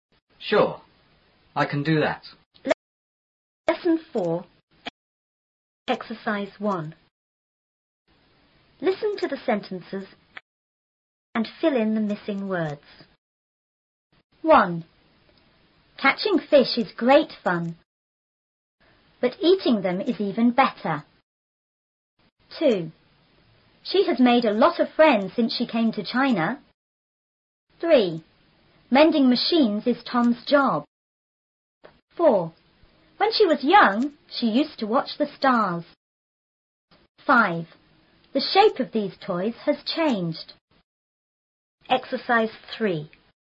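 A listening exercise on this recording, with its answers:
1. ___fish is great fun,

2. but___them is___better.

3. She has___a lot of___ ___she came to China.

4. ___ ___is Tom's job.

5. When she was___,she___to watch the___.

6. The___of these___has___.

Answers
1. Catching
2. eating; even
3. made; friends since
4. Mending machines
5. young; used; stars
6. shape; toys; changed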